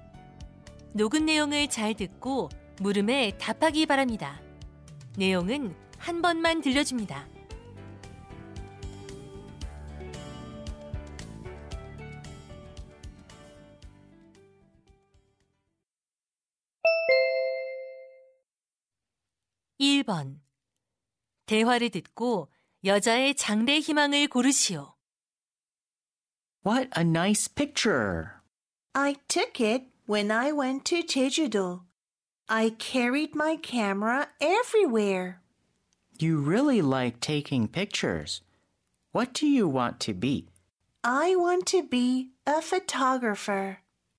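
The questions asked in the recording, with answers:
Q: 대화를 듣고 여자의 장래 희망을 고르시오.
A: 사진작가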